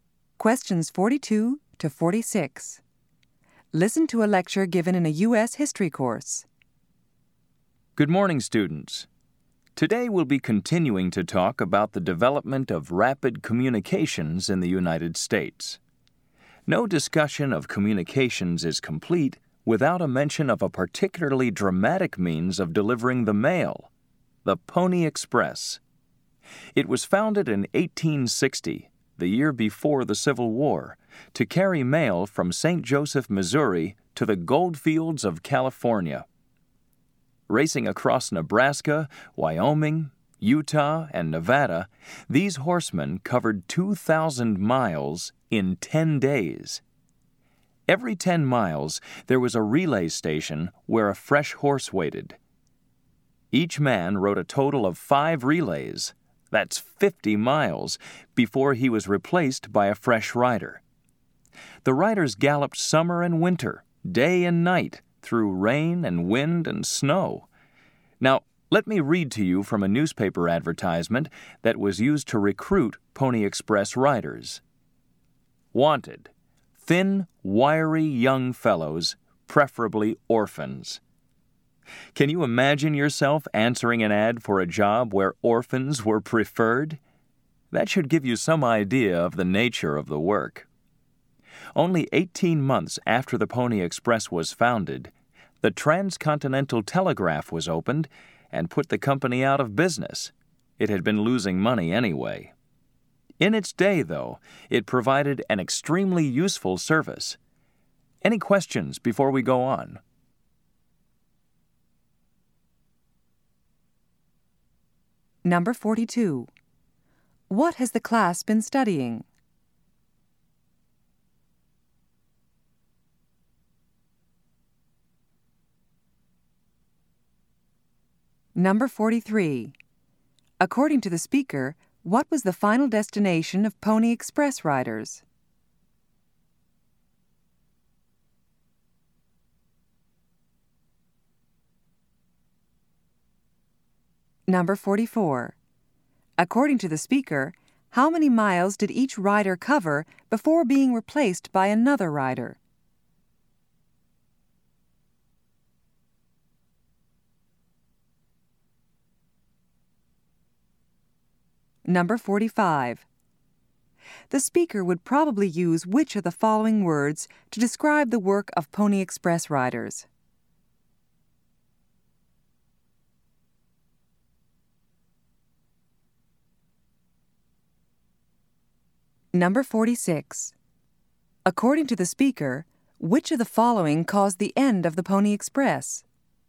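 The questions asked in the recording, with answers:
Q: What has the class been studying?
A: The development of rapid communications in the United States

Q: According to the speaker, what was the final destination of Pony Express riders?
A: The gold fields of California

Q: According to the speaker, how many miles did each rider cover before being replaced by another rider?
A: 50 miles

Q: According to the speaker, which of the following caused the end of the Pony Express?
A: The opening of the Transcontinental Telegraph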